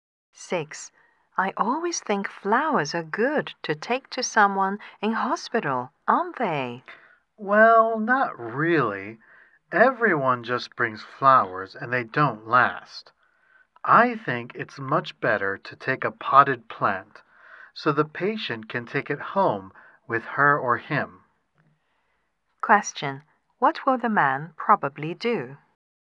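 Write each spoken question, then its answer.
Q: What will the man probably do?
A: Take a potted plant to the patient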